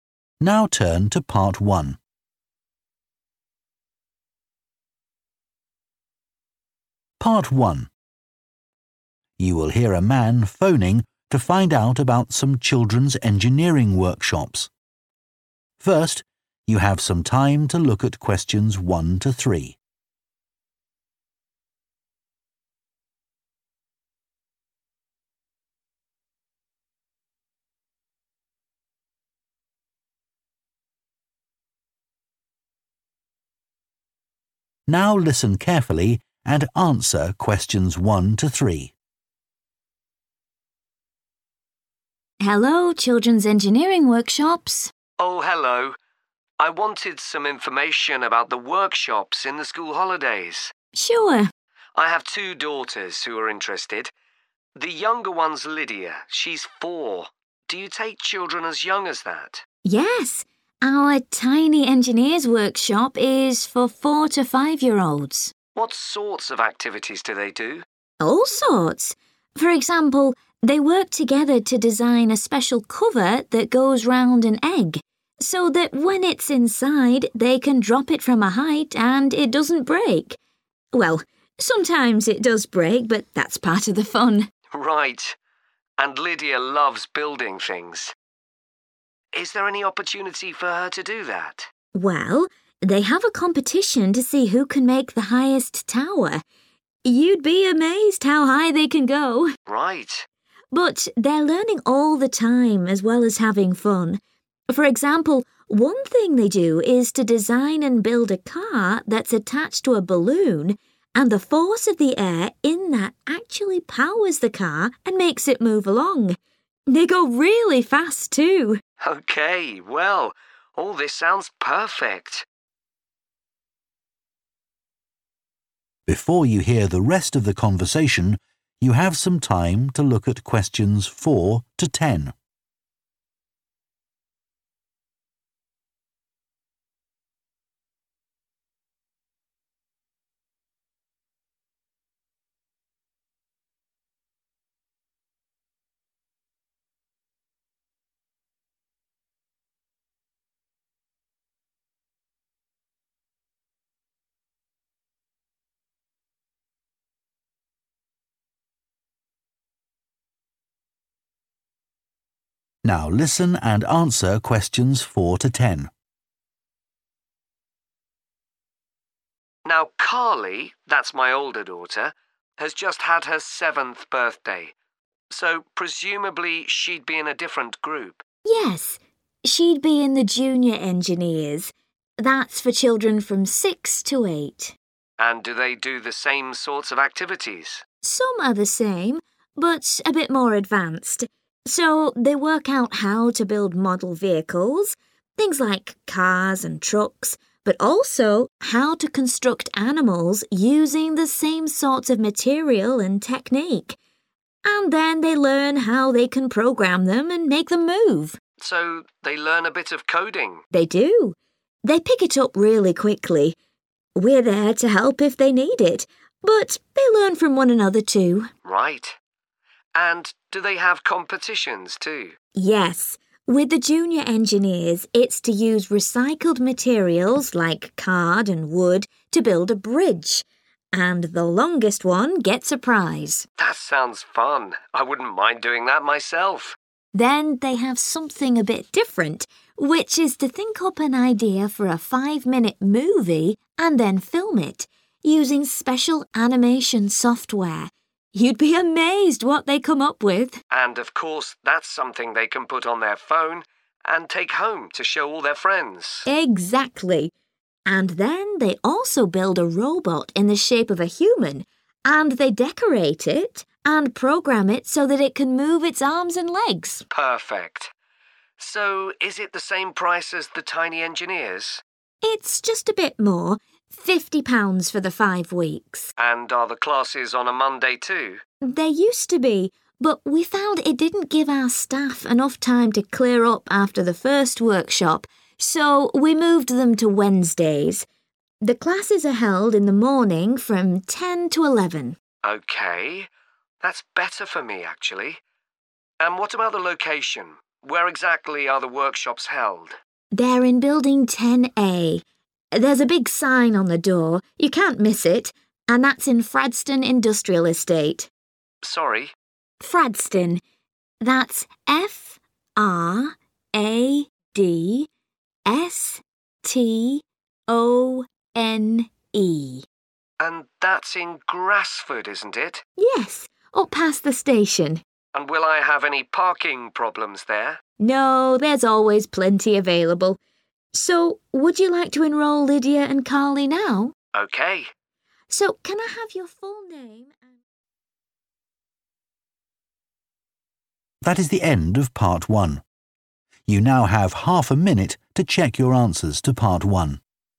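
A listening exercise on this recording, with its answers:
Complete the notes below. Write ONE WORD AND/OR A NUMBER for each answer.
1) Create a cover for an 1 ..................... so they can drop it from a height without breaking it.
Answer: egg

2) Take part in a competition to build the tallest 2 ..................... .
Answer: tower

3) Make a 3 ..................... powered by a balloon.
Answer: car

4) Build model cars, trucks and 4 ..................... and learn how to program them so they can move.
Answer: animals

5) Take part in a competition to build the longest 5 ..................... using card and wood.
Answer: bridge

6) Create a short 6 ..................... with special software.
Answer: movie

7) Build, 7 ..................... and program a humanoid robot.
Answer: decorate

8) Held on 8 ..................... from 10 am to 11 am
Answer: Wednesdays

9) Building 10A, 9 ..................... 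Industrial Estate, Grasford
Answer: Fradstone

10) Plenty of 10 ..................... is available.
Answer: parking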